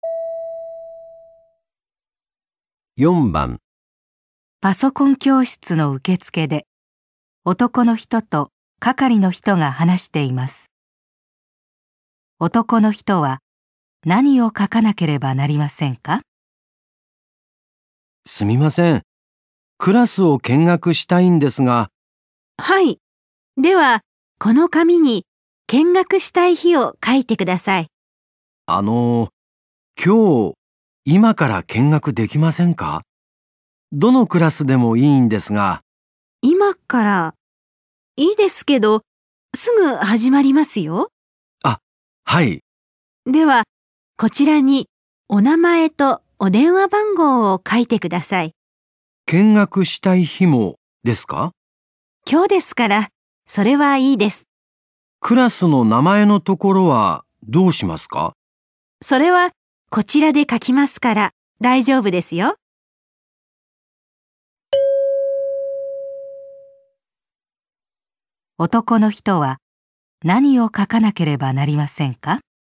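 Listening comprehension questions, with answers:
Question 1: 男人必须写什么呢?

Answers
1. 名前と電話番号

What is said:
男:あのう、今日、今から見学できませんか。
どのクラスでもいいんですが。
女:今から。
いいですけど、すぐ始まりますよ。
男:あっ、はい。
女:では、こちらにお名前とお電話番号を書いてください。
男:見学したい日もですか。
女:今日ですから、それはいいです。
男:クラスの名前のところはどうしますか。
女:それはこちらで書きますから、大丈夫ですよ。
男の人は何を書かなければなりませんか。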